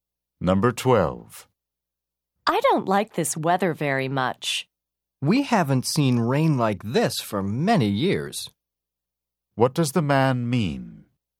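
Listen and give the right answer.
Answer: It hasn't rained this much in years.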